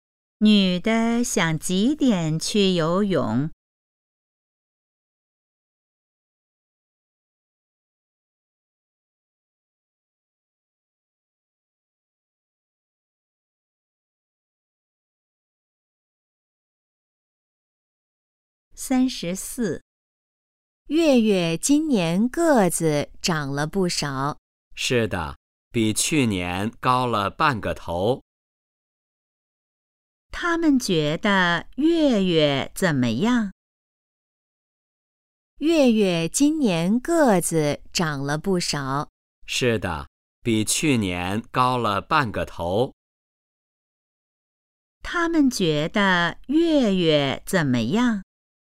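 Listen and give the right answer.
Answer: 长高了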